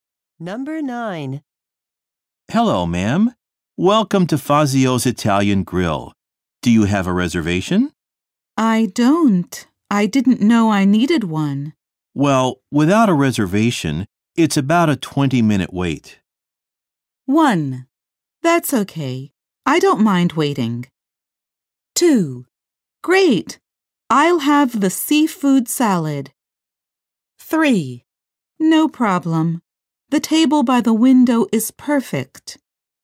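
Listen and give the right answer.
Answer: 1: That's okay. I don't mind waiting.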